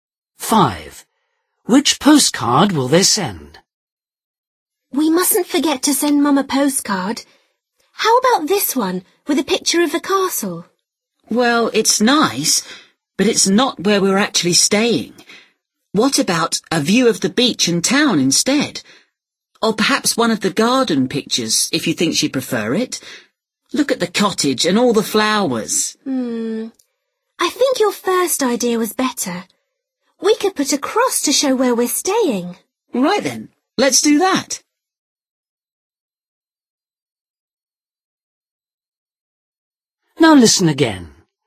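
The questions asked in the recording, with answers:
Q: Which postcard will they send?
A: The one with a picture of the castle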